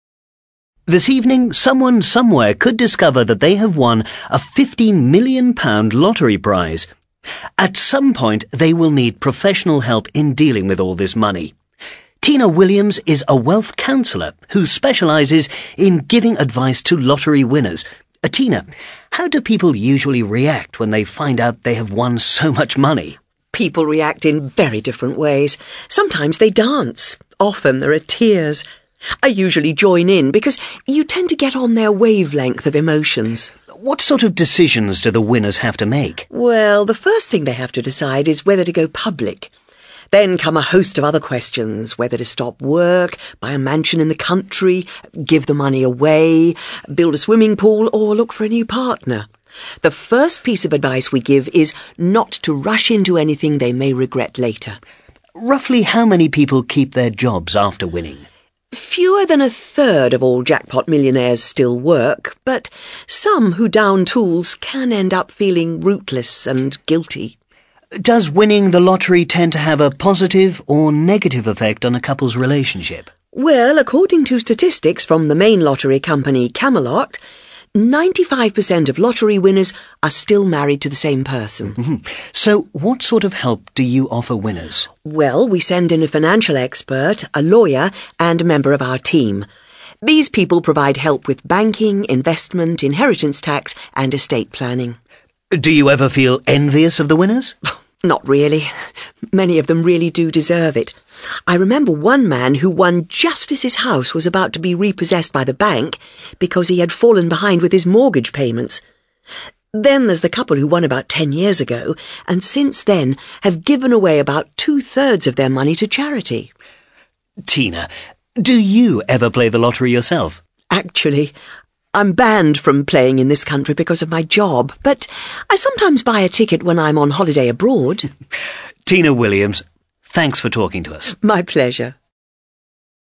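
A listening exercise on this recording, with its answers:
ACTIVITY 110: You are going to listen to a TV interview with Tina Williams. Listen carefully and answer the three questions below. Then check the audio transcription and the answers.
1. What is her job?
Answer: A wealth counsellor who advises lottery winners

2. Who does she work with?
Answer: Lottery winners (with a financial expert and a lawyer)

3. Tina tries to keep her distance emotionally from her clients.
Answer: FALSE

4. The first piece of advice she gives clients is not to take too many quick decisions.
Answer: TRUE

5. Some clients who give up work feel they don't belong anywhere.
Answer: TRUE

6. The stress of winning causes many couples to break up.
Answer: FALSE

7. Tina remembers a couple who gave all of their winnings away.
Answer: FALSE

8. Tina is not allowed to buy lottery tickets in the UK.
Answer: TRUE

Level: CAE Certificate in Advanced English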